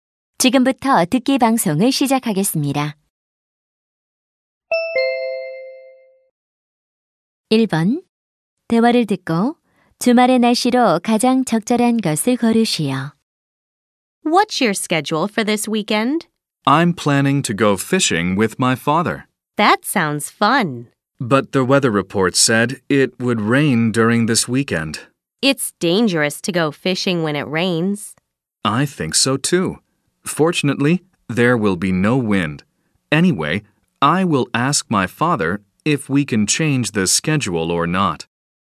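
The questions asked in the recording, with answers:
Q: 대화를 듣고 주말의 날씨로 가장 적절한 것을 고르시오.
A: 비가 오고 바람은 없음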